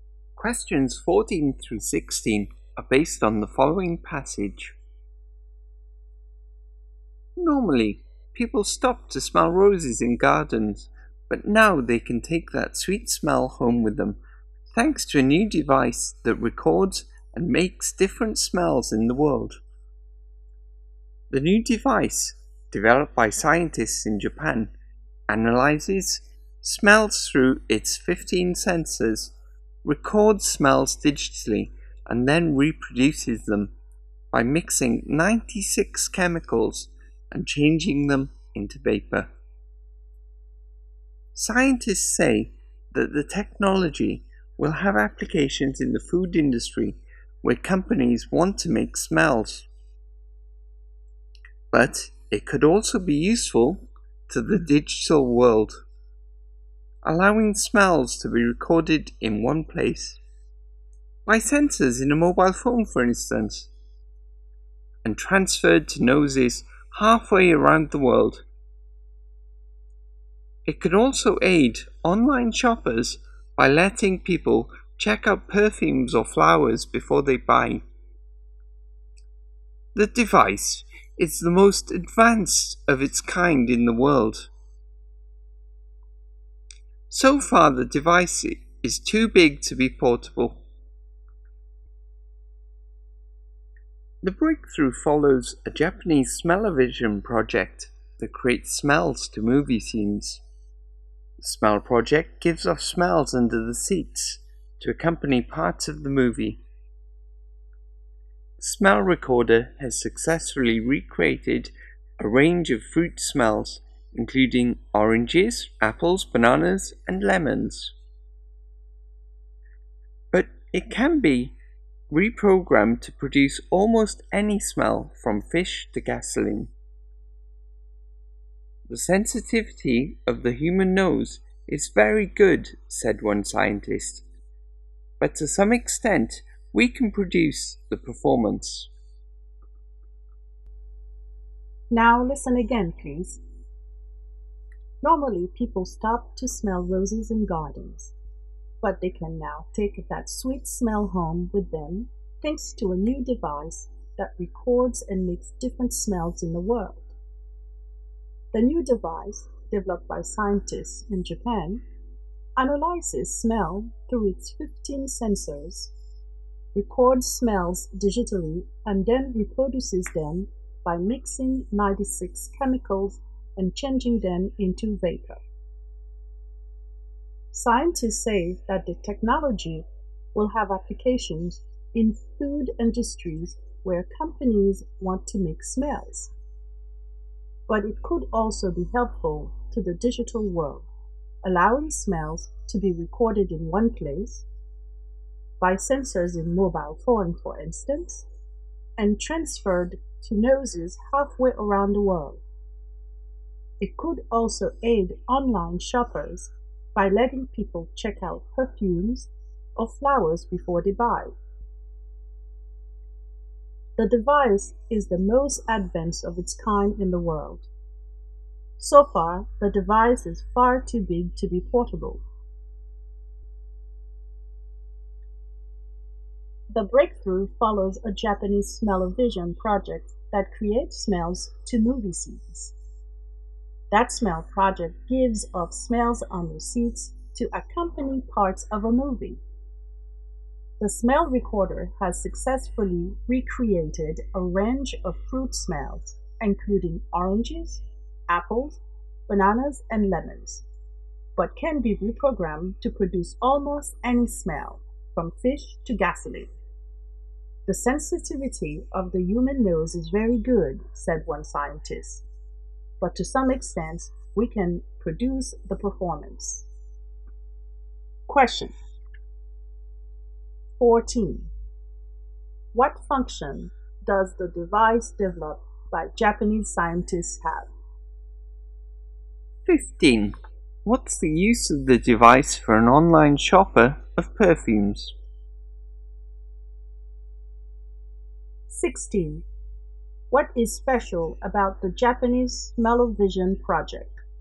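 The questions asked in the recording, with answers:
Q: What function does the device developed by Japanese scientists have?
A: It records smells and reproduces them

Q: What's the use of the device for an online shopper of perfumes?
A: Shoppers can smell perfumes before they buy

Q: What is special about the Japanese Smell-O-Vision project?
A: It creates smells to go with movie scenes, given off under the seats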